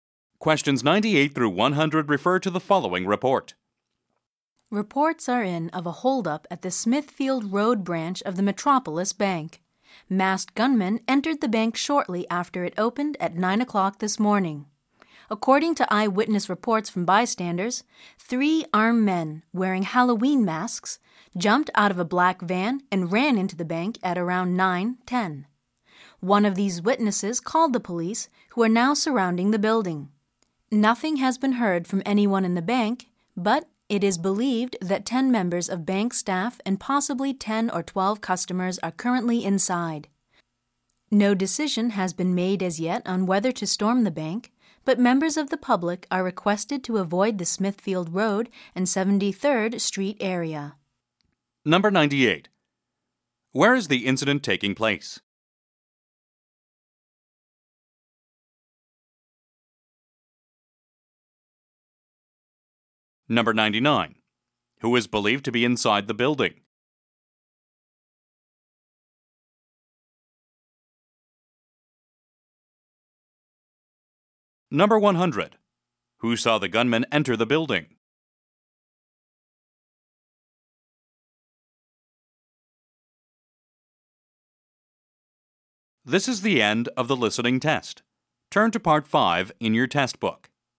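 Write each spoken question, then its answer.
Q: Where is the incident taking place?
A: At the Smithfield Road branch of the Metropolis Bank

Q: Who is believed to be inside the building?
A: Bank staff and customers

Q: Who saw the gunman enter the building?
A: Bystanders (eyewitnesses)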